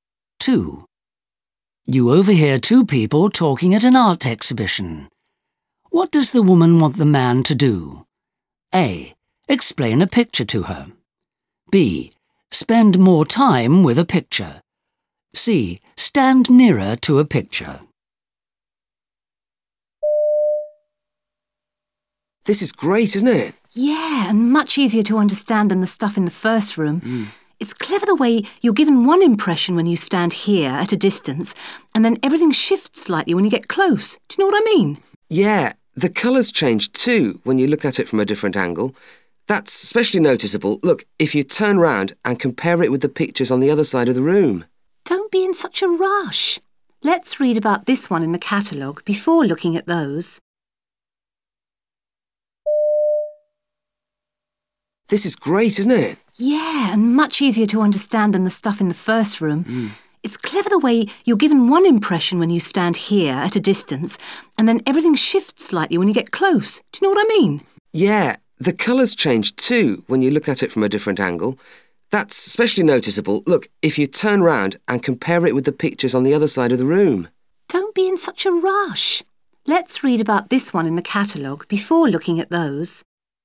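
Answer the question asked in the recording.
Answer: B: Spend more time with a picture.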